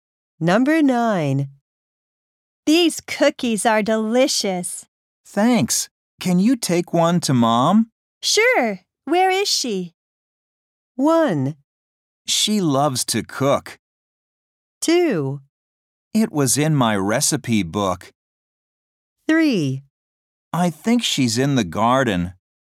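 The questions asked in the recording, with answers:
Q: Sure. Where is she?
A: 3: I think she's in the garden.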